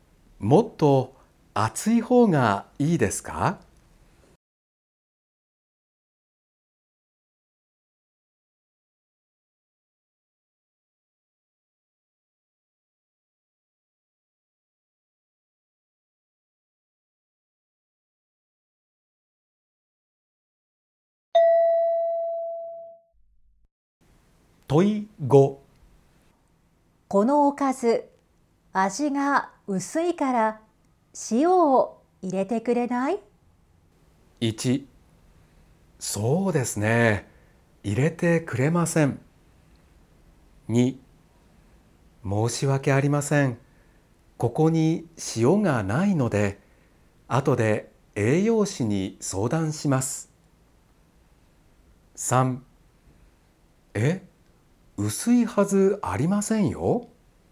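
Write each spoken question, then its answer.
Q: このおかず、味が薄いから塩を入れてくれない?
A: 2: 申し訳ありません。ここに塩がないので、後で栄養士に相談します。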